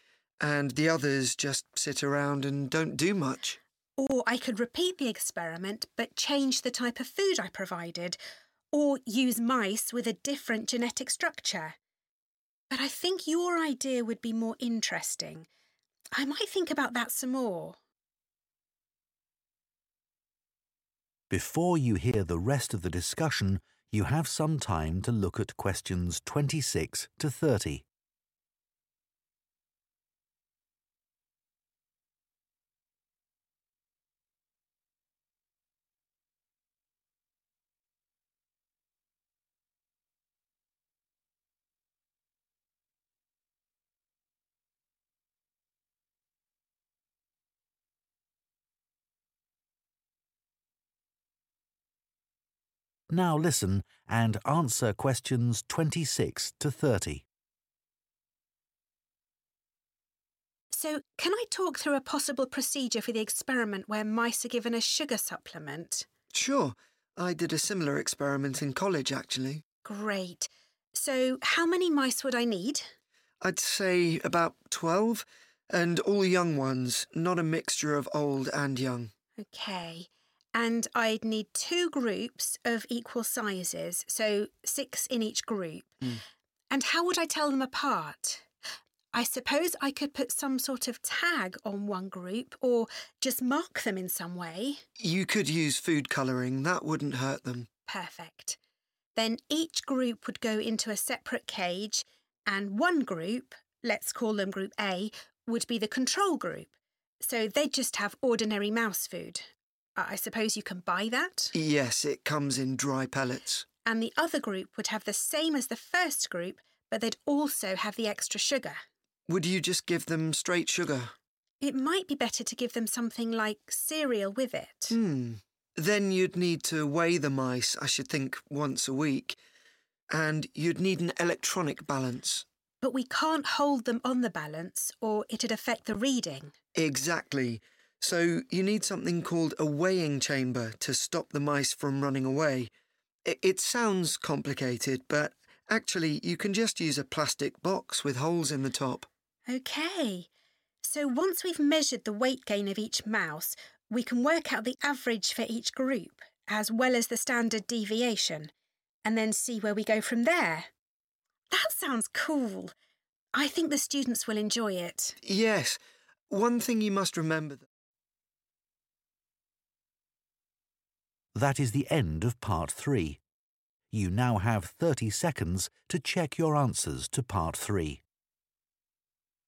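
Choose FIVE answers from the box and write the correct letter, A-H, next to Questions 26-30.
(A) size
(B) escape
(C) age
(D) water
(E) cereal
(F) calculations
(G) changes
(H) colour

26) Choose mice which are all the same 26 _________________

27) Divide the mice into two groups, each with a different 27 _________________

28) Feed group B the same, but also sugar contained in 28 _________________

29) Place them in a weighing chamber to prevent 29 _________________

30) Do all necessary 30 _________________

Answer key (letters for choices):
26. C
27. H
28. E
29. B
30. F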